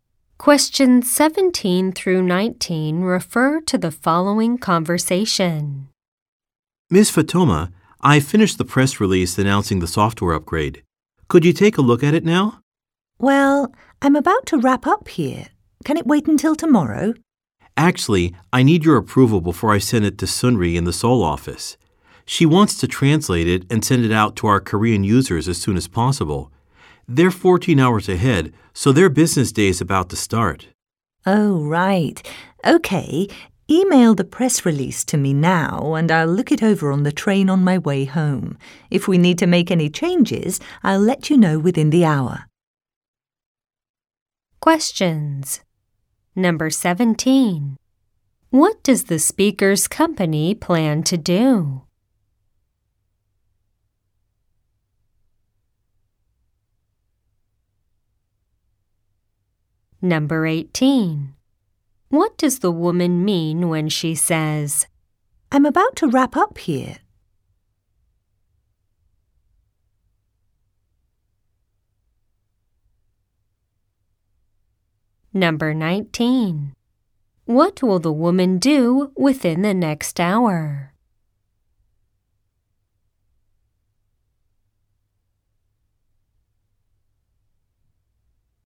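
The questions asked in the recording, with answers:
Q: What does the speaker's company plan to do?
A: Release a software upgrade

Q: What does the woman mean when she says, "I'm about to wrap up here"?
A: She is about to leave work for the day

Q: What will the woman do within the next hour?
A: Review the press release and say whether changes are needed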